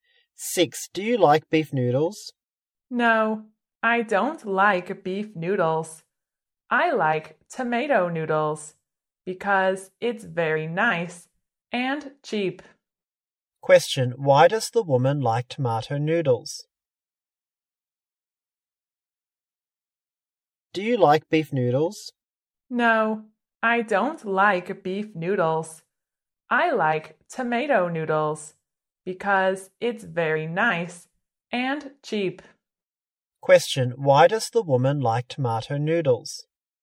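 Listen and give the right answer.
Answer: Because it's very nice and cheap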